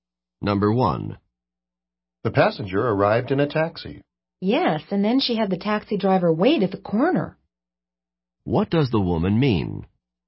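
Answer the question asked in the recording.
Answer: The taxi driver waited at the corner for the passenger.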